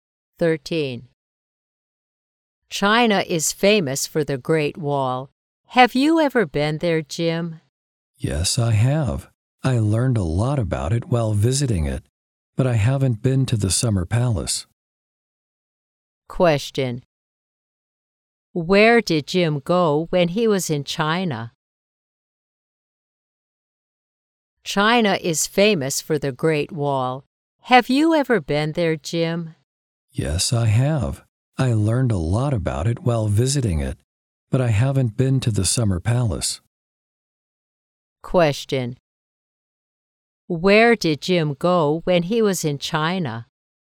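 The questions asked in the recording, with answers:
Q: Where did Jim go when he was in China?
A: The Great Wall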